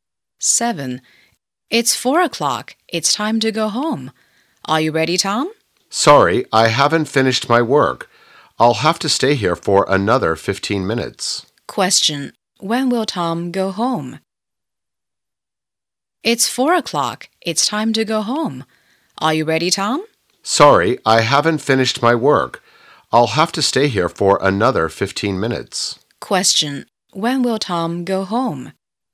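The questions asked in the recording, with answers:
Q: When will Tom go home?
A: At 4:15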